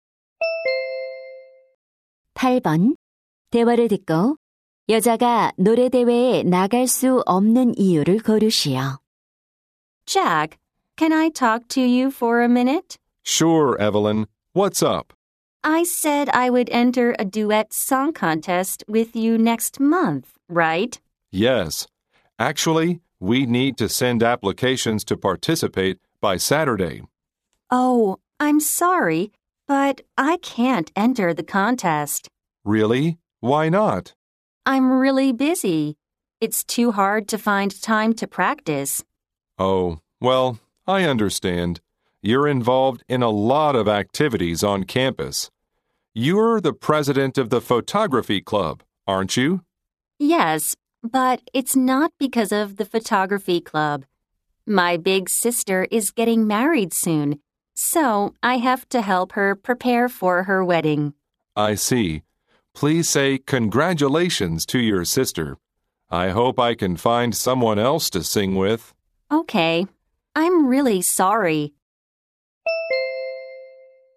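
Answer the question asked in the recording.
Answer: 언니의 결혼 준비를 도와야 해서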